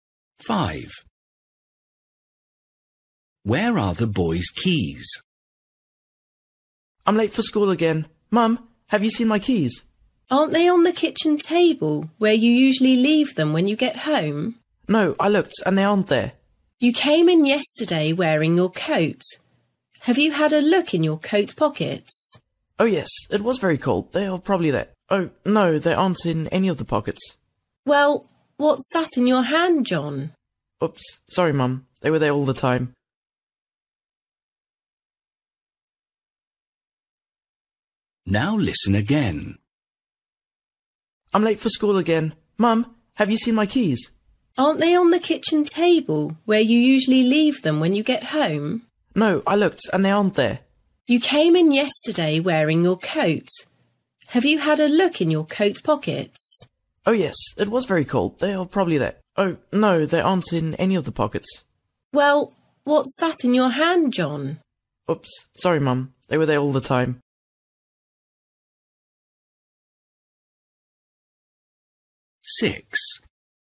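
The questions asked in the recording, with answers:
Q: Where are the boy's keys?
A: In his hand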